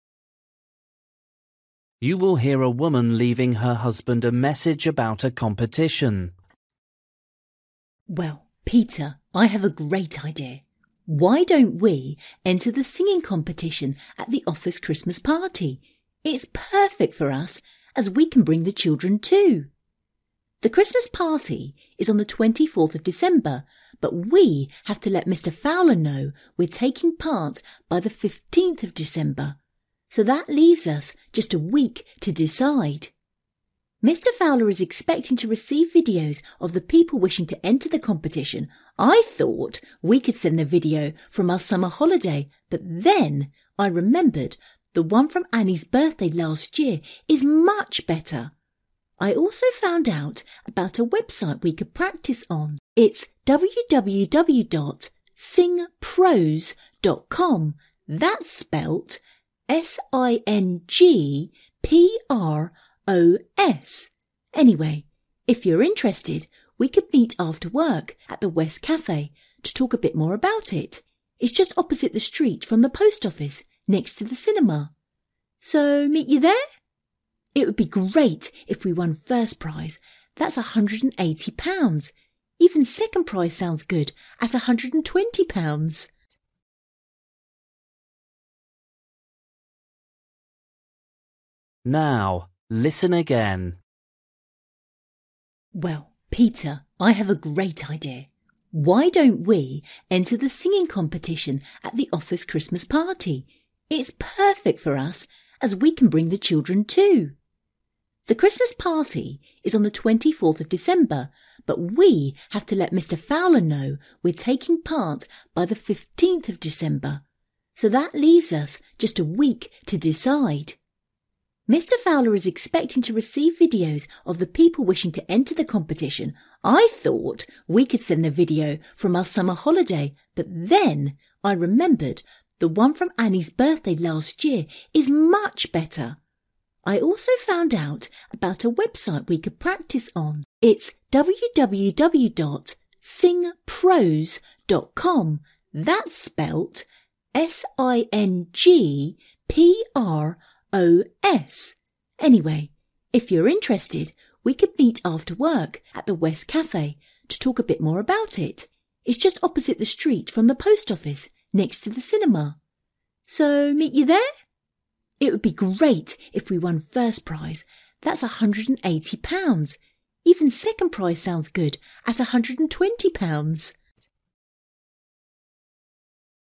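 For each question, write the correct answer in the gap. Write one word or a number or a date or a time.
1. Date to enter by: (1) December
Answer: 15th

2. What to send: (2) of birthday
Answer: video

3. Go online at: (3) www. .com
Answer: singpros

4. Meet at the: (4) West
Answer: Cafe

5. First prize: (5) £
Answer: 180

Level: Luyện nghe trình độ A2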